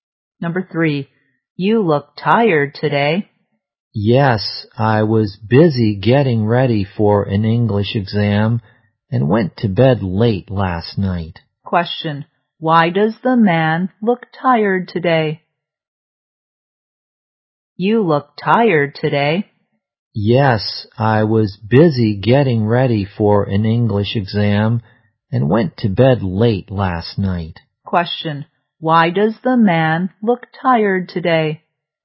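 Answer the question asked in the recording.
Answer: He went to bed late getting ready for an English exam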